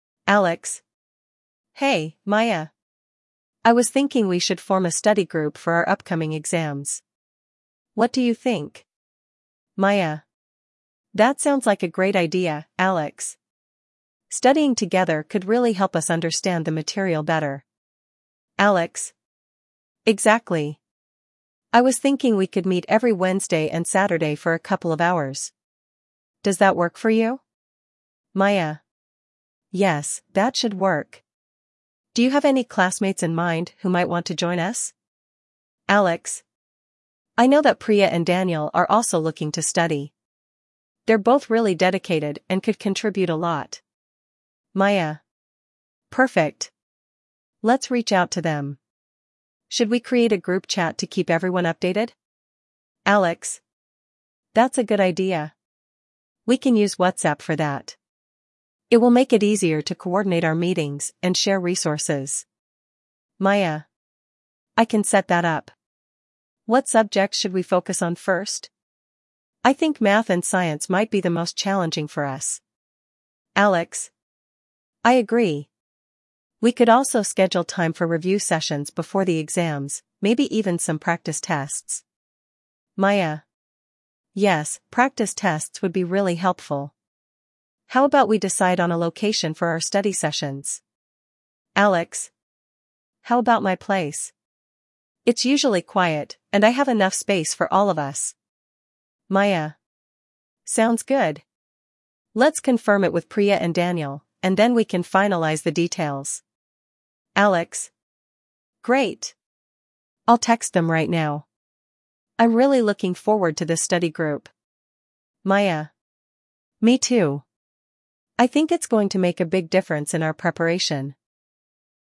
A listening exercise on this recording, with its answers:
You will hear the audio only once, so focus on key details. After listening, select the best answer for each question.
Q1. What is the main purpose of Alex and Maya's conversation?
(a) To plan a party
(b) To organize a study group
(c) To discuss a project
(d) To choose a class schedule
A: To organize a study group

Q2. How often do Alex and Maya plan to meet for their study sessions?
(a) Every day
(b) Once a week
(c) Every Wednesday and Saturday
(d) Once a month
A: Every Wednesday and Saturday

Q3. Which two classmates do Alex and Maya want to invite to the study group?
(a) John and Lisa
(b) Priya and Daniel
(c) Sam and Rachel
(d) Tom and Sarah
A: Priya and Daniel

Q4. What platform do they decide to use for group communication?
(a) Facebook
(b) Email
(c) WhatsApp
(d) Instagram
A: WhatsApp

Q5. What subjects do Alex and Maya think will be most challenging?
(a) History and English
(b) Math and Science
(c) Art and Music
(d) Geography and Computer Science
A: Math and Science

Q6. What additional study method do they discuss using?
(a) Group projects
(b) Watching videos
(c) Practice tests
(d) Reading textbooks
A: Practice tests

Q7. Where do they plan to hold their study sessions?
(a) At the library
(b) At Maya's place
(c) At Alex's place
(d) At a coffee shop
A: At Alex's place

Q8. What does Maya offer to do for the study group?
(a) Organize snacks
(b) Set up a group chat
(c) Find a tutor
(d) Create study materials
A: Set up a group chat

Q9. How do Alex and Maya feel about forming the study group?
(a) Indifferent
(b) Excited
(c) Anxious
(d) Frustrated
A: Excited

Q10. What is the overall theme of their conversation?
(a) Planning a vacation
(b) Organizing a study group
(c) Discussing career options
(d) Choosing classes for next semester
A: Organizing a study group

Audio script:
[Alex]
Hey, Maya! I was thinking we should form a study group for our upcoming exams. What do you think?
[Maya]
That sounds like a great idea, Alex! Studying together could really help us understand the material better.
[Alex]
Exactly! I was thinking we could meet every Wednesday and Saturday for a couple of hours. Does that work for you?
[Maya]
Yes, that should work. Do you have any classmates in mind who might want to join us?
[Alex]
I know that Priya and Daniel are also looking to study. They're both really dedicated and could contribute a lot.
[Maya]
Perfect! Let's reach out to them. Should we create a group chat to keep everyone updated?
[Alex]
That's a good idea. We can use WhatsApp for that. It will make it easier to coordinate our meetings and share resources.
[Maya]
I can set that up! What subjects should we focus on first? I think math and science might be the most challenging for us.
[Alex]
I agree! We could also schedule time for review sessions before the exams, maybe even some practice tests.
[Maya]
Yes, practice tests would be really helpful. How about we decide on a location for our study sessions?
[Alex]
How about my place? It's usually quiet, and I have enough space for all of us.
[Maya]
Sounds good! Let's confirm it with Priya and Daniel, and then we can finalize the details.
[Alex]
Great! I'll text them right now. I'm really looking forward to this study group!
[Maya]
Me too! I think it's going to make a big difference in our preparation.

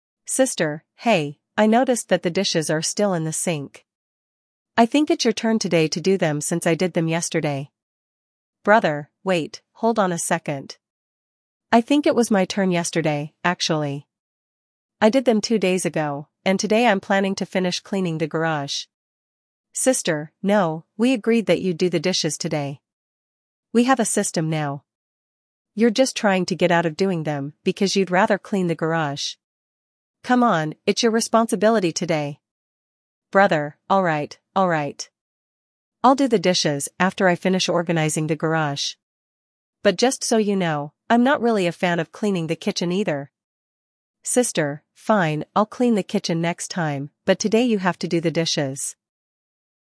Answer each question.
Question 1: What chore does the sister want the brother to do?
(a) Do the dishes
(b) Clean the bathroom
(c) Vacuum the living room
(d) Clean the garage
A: Do the dishes

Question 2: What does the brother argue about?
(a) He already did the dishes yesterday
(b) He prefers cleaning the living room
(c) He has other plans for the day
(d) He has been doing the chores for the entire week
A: He already did the dishes yesterday

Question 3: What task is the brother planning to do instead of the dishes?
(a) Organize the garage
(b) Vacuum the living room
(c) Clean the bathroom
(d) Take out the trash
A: Organize the garage

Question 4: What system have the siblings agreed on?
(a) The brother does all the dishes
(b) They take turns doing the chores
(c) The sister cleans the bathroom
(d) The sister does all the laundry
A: They take turns doing the chores

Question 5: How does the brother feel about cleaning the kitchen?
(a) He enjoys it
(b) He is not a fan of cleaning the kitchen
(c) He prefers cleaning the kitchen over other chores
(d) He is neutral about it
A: He is not a fan of cleaning the kitchen

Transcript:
Sister: "Hey, I noticed that the dishes are still in the sink. I think it's your turn today to do them since I did them yesterday."
Brother: "Wait, hold on a second. I think it was my turn yesterday, actually. I did them two days ago, and today I'm planning to finish cleaning the garage."
Sister: "No, we agreed that you'd do the dishes today. We have a system now. You're just trying to get out of doing them because you'd rather clean the garage. Come on, it's your responsibility today!"
Brother: "Alright, alright. I'll do the dishes after I finish organizing the garage. But just so you know, I'm not really a fan of cleaning the kitchen either!"
Sister: "Fine, I'll clean the kitchen next time, but today you have to do the dishes."

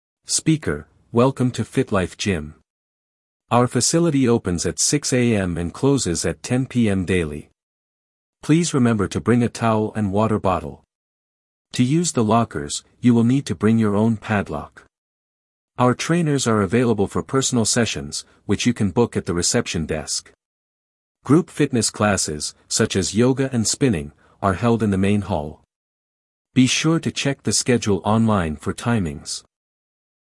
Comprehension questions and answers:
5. What time does the gym close?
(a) 8 PM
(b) 9 PM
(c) 10 PM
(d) 11 PM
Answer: 10 PM

